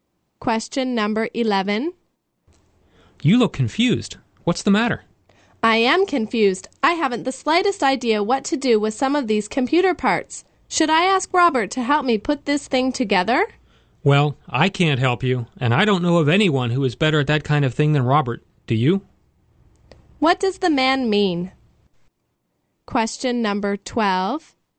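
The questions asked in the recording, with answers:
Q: What does the man mean?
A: Robert is the best person to ask for help.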